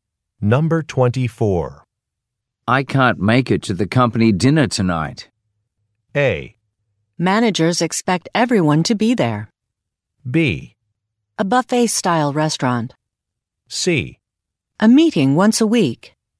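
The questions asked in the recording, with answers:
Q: I can't make it to the company dinner tonight.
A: A: Managers expect everyone to be there.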